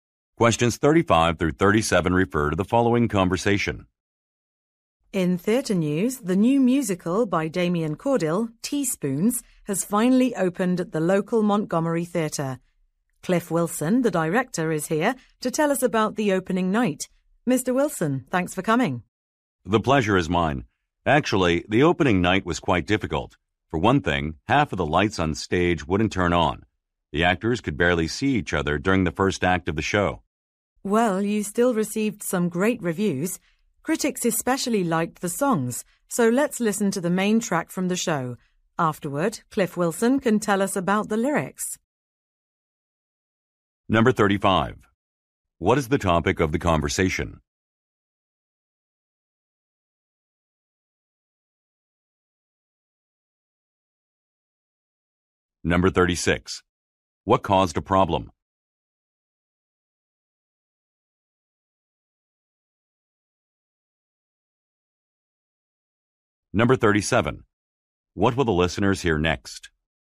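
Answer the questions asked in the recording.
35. The opening night of a new musical
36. Stage lights that would not turn on
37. A song from the show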